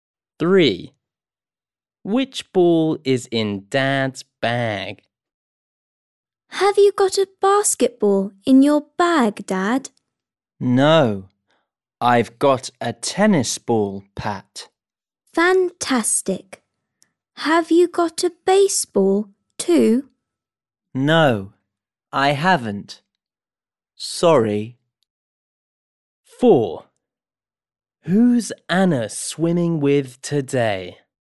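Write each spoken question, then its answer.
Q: Which ball is in Dad's bag?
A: a tennis ball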